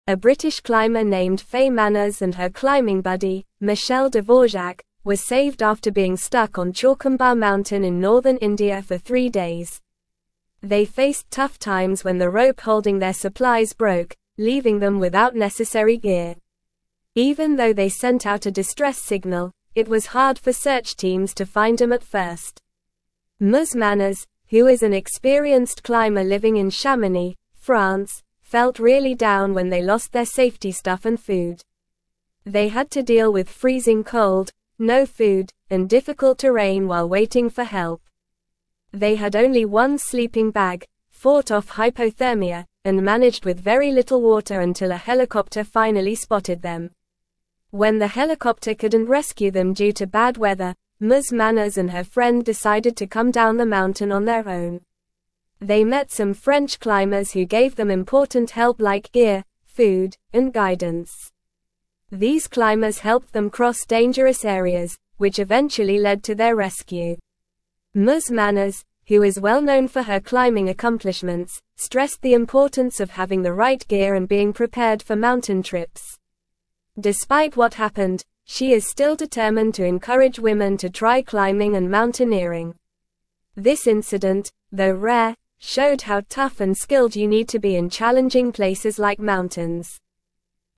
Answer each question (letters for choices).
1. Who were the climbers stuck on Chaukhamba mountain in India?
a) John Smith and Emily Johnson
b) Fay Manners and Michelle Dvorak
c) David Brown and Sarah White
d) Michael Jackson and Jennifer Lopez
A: b

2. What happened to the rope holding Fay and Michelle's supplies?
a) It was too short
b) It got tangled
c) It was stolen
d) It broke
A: d

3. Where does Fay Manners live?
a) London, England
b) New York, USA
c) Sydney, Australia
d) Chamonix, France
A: d

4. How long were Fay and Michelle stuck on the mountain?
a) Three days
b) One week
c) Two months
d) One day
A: a

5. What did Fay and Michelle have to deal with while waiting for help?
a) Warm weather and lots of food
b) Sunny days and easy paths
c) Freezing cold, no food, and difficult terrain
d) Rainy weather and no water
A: c

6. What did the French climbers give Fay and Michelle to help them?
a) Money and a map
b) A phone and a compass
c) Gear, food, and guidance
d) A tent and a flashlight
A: c

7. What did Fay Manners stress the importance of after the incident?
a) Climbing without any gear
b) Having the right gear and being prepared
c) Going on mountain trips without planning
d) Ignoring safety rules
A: b

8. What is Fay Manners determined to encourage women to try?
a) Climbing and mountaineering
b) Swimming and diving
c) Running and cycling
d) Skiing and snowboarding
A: a

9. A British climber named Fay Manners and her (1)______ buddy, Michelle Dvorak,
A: climbing

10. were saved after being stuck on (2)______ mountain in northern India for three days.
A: Chaukhamba

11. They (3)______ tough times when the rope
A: faced

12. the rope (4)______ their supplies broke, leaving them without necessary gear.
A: holding

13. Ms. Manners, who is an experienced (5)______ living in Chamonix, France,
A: climber

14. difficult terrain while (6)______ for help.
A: waiting

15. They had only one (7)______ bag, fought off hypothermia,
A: sleeping

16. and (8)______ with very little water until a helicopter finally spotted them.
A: managed

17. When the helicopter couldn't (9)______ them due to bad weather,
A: rescue

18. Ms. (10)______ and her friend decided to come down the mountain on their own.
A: Manners

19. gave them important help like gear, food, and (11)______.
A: guidance

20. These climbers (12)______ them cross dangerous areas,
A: helped

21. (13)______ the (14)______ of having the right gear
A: stressed

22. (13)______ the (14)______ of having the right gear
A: importance

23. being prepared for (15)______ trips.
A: mountain

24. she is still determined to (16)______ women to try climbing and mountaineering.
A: encourage

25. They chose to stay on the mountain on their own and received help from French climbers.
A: False

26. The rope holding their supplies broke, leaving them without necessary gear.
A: True

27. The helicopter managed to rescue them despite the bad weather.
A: False

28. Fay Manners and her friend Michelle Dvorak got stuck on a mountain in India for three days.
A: True

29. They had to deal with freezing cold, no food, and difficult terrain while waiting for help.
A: True

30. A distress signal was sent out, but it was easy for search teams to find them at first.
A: False

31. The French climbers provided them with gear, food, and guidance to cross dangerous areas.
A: True

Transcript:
A British climber named Fay Manners and her climbing buddy, Michelle Dvorak, were saved after being stuck on Chaukhamba mountain in northern India for three days. They faced tough times when the rope holding their supplies broke, leaving them without necessary gear. Even though they sent out a distress signal, it was hard for search teams to find them at first.
Ms. Manners, who is an experienced climber living in Chamonix, France, felt really down when they lost their safety stuff and food. They had only one sleeping bag, fought off hypothermia, and managed with very little water until a helicopter finally spotted them.
When the helicopter couldn't rescue them due to bad weather, Ms. Manners and her friend decided to come down the mountain on their own. They met some French climbers who gave them important help like gear, food, and guidance. These climbers helped them cross dangerous areas, which eventually led to their rescue.
Ms. Manners, who is well-known for her climbing accomplishments, stressed the importance of having the right gear and being prepared for mountain trips. Despite what happened, she is still determined to encourage women to try climbing and mountaineering. This incident, though rare, showed how tough and skilled you need to be in challenging places like mountains.

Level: Level 3